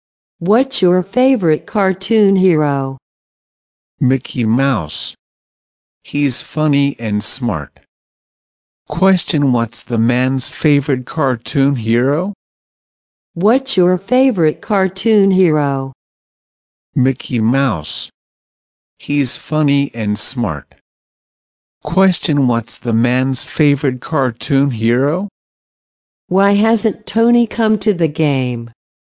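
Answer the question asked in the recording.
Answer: Mickey Mouse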